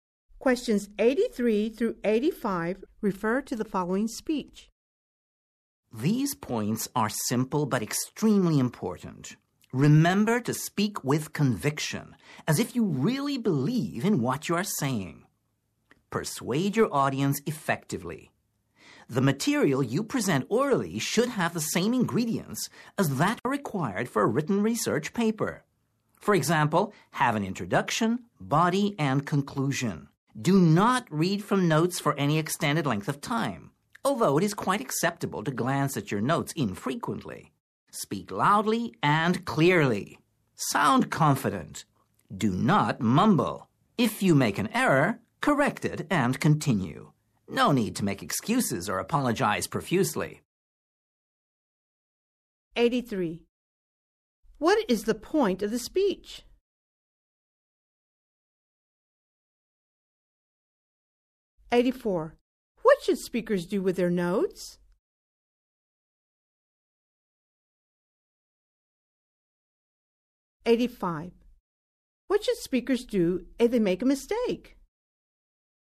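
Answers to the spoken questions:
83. To give tips for oral presentations
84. Only glance at them infrequently
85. Correct it and continue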